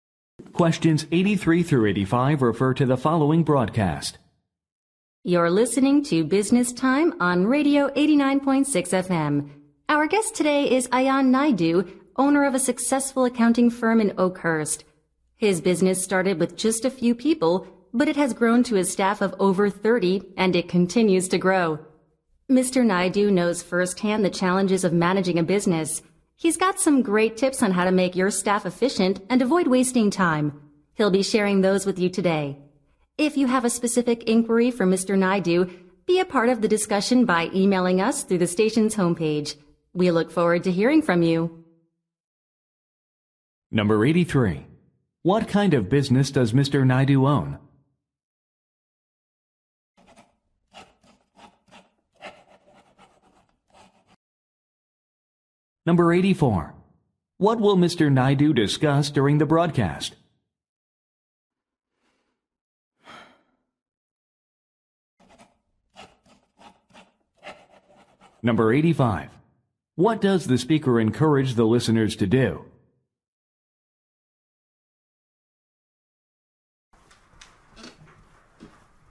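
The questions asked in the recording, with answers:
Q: What kind of business does Mr.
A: An accounting firm

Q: Naidu discuss during the broadcast?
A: Tips for making staff efficient and avoiding wasted time

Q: What does the speaker encourage the listeners to do?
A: Email questions through the station's homepage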